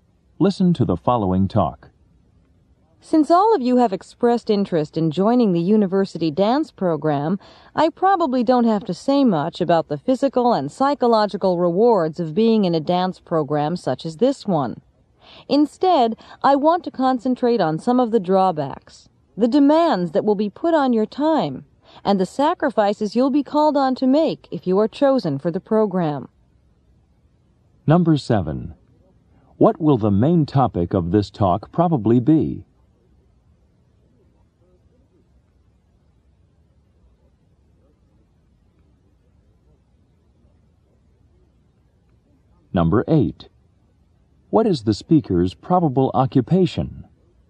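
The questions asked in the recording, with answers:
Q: What will the main topic of this talk probably be?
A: The drawbacks and demands of being in the university dance program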